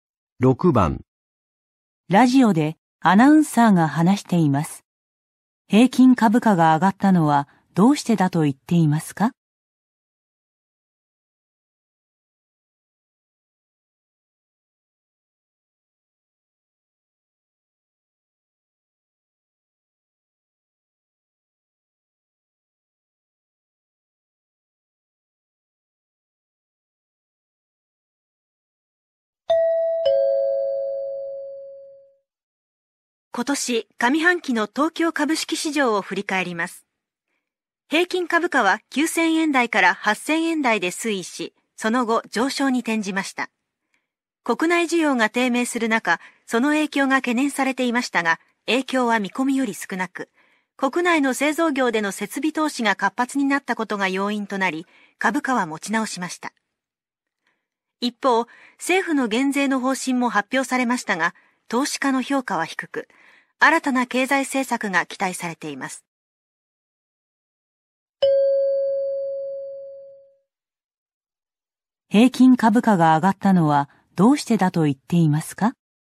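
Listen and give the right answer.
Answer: 国内の製造業の設備投資が活発になったから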